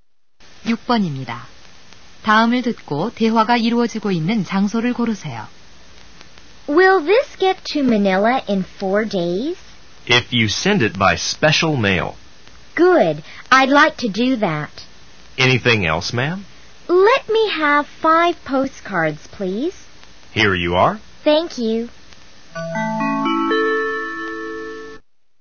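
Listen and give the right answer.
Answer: 우체국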